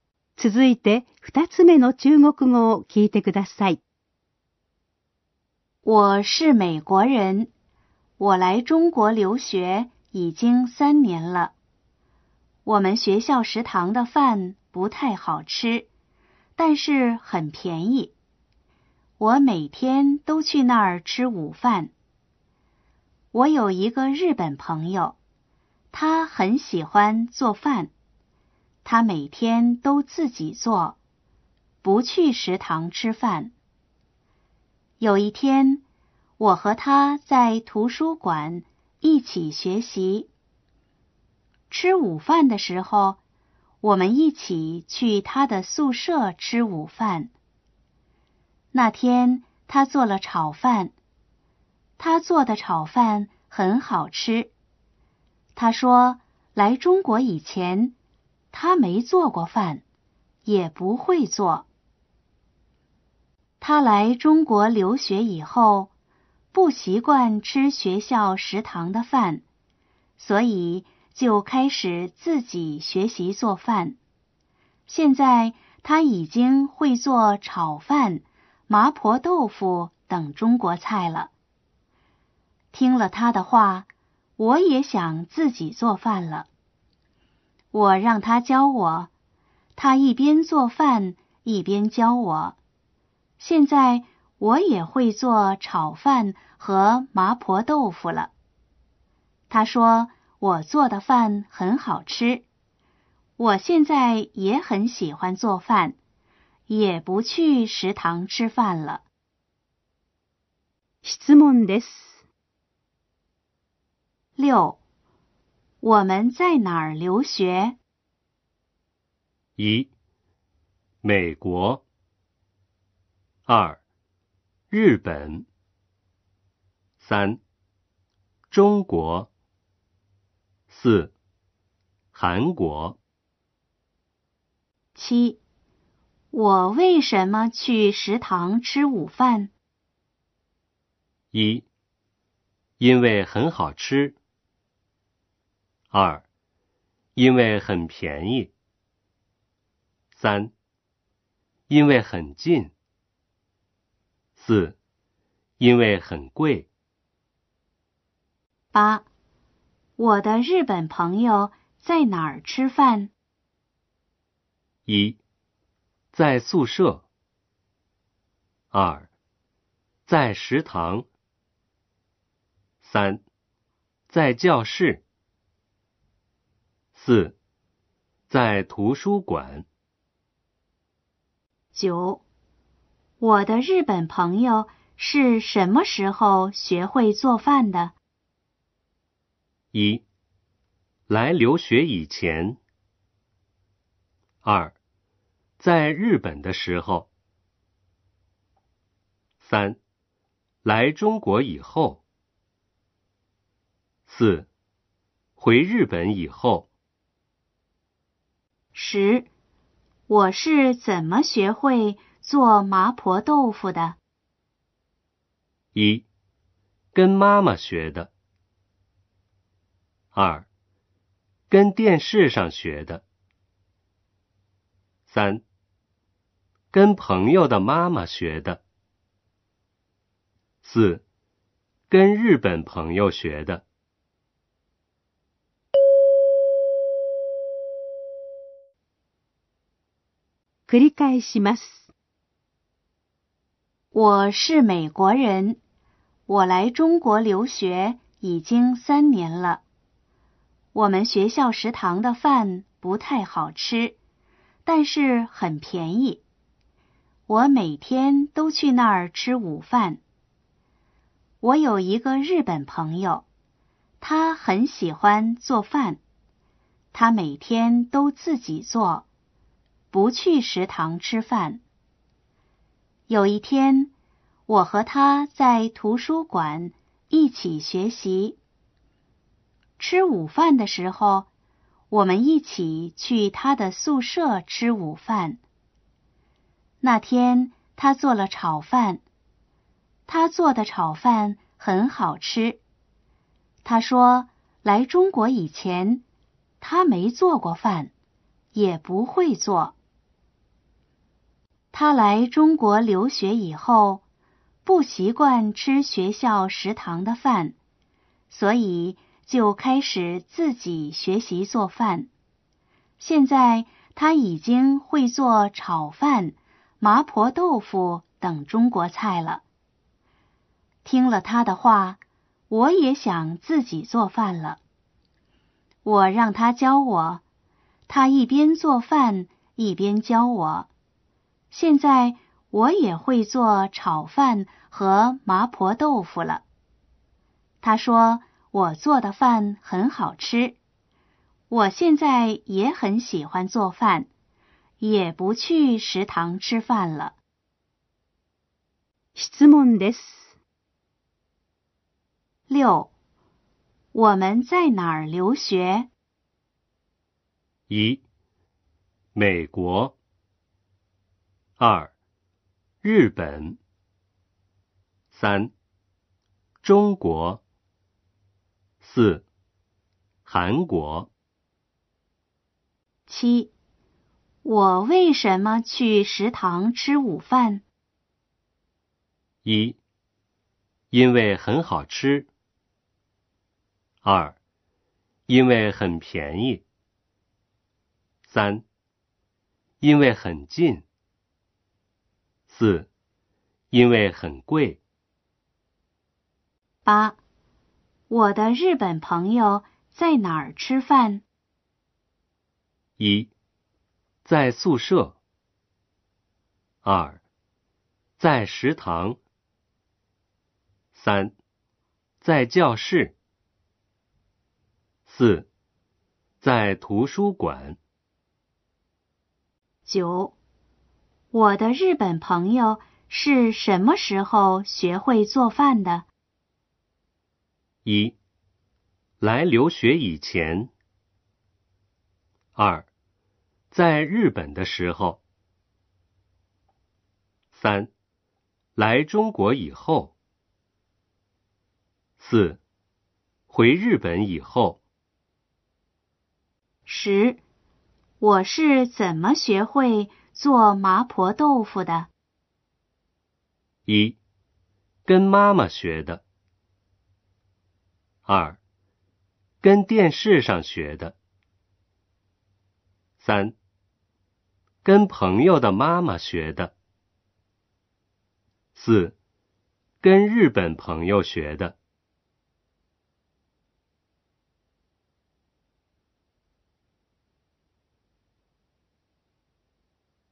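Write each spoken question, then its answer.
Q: 我们在哪儿留学?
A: 3: 中国。

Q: 我为什么去食堂吃午饭?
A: 2: 因为很便宜。

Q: 我的日本朋友在哪儿吃饭?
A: 1: 在宿舍。

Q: 我的日本朋友是什么时候学会做饭的?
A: 3: 来中国以后。

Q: 我是怎么学会做麻婆豆腐的?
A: 4: 跟日本朋友学的。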